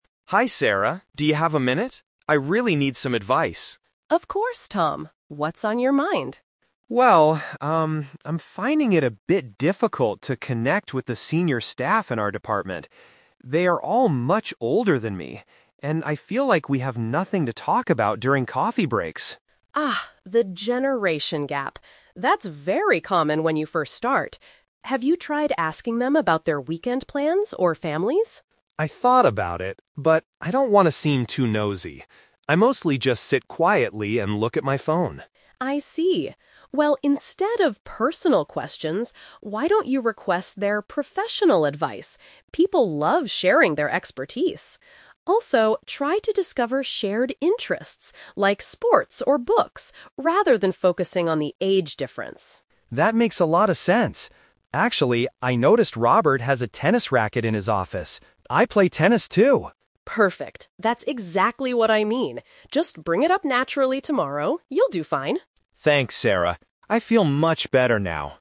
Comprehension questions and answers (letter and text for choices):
Listen to a conversation between a young employee and his mentor. Choose the best answer (A, B, or C) for each question.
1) What is Tom's main problem?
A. He doesn't know how to complete his daily work tasks.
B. He struggles to build a relationship with older coworkers.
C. He is annoyed because his colleagues ask him personal questions.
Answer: B. He struggles to build a relationship with older coworkers.

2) What does Sarah suggest Tom do to start a conversation?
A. Request their help with work-related topics.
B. Ask them about their children and weekends.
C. Invite them to play a match of tennis after work.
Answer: A. Request their help with work-related topics.

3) What will Tom most likely do tomorrow?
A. Bring his own sports equipment to the office.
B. Sit quietly and look at his phone during breaks.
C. Talk to a colleague about a common hobby.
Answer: C. Talk to a colleague about a common hobby.

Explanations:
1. Tom says he is finding it difficult to "connect with the senior staff." In this context, "senior staff" means older coworkers, and "connect with" means build a relationship. Trap: Option A is plausible for a young employee, but not mentioned. Option C is a trap; Tom mentions "personal questions" because he doesn't want to seem nosy by asking them, not because they are asking him.
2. Sarah advises Tom to "request their professional advice." Professional advice is a paraphrase of work-related topics. Trap: Option B is a trap because Sarah initially asks if he tried talking about weekends/families, but Tom rejected this idea (he doesn't want to be nosy). Option C is incorrect; they talk about tennis as an interest, but she doesn't tell him to invite anyone to play.
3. Tom realizes he and Robert both play tennis (a shared interest/hobby). Sarah tells him to "bring it up naturally tomorrow," meaning he will talk to Robert about it. Trap: Option A is wrong because he noticed Robert's racket; he isn't planning to bring his own. Option B is a trap because sitting and looking at his phone is his past/current bad habit, not what he will do tomorrow.

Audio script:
Tom: Hi Sarah, do you have a minute? I really need some advice.
Sarah: Of course, Tom. What's on your mind?
Tom: Well, um, I'm finding it a bit difficult to connect with the senior staff in our department. They are all much older than me, and I feel like we have nothing to talk about during coffee breaks.
Sarah: Ah, the generation gap. That's very common when you first start. Have you tried asking them about their weekend plans or families?
Tom: I thought about it, but I don't want to seem too nosy. I mostly just sit quietly and look at my phone.
Sarah: I see. Well, instead of personal questions, why don't you request their professional advice? People love sharing their expertise. Also, try to discover shared interests, like sports or books, rather than focusing on the age difference.
Tom: That makes a lot of sense. Actually, I noticed Robert has a tennis racket in his office. I play tennis too!
Sarah: Perfect! That's exactly what I mean. Just bring it up naturally tomorrow. You'll do fine.